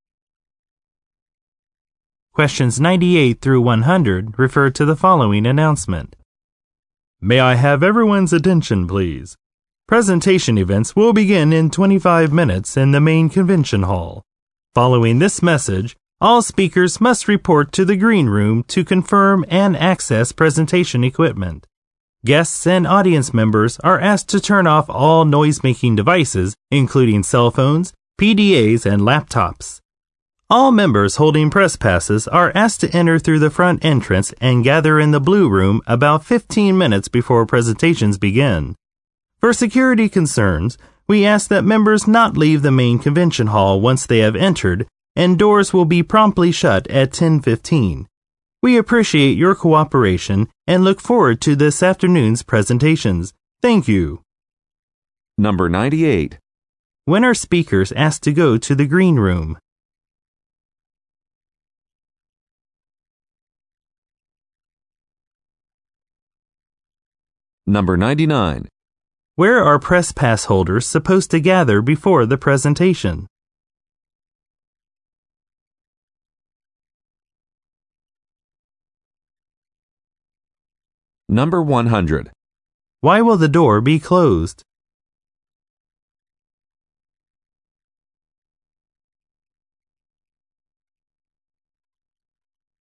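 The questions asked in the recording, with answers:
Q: When are speakers asked to go to the green room?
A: Right after this message

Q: Where are press pass holders supposed to gather before the presentation?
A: In the blue room

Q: Why will the door be closed?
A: For security reasons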